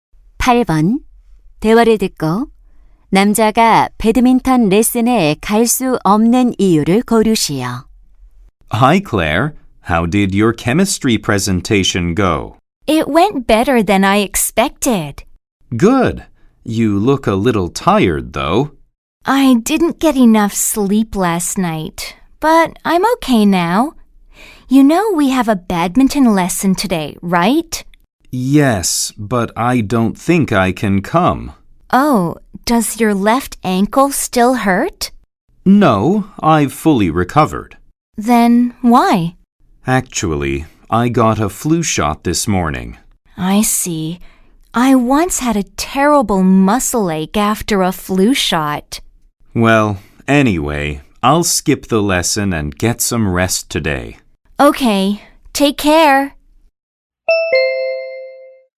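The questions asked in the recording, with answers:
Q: 남자가 배드민턴 레슨에 갈 수 없는 이유를 고르시오.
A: 독감 예방 주사를 맞아서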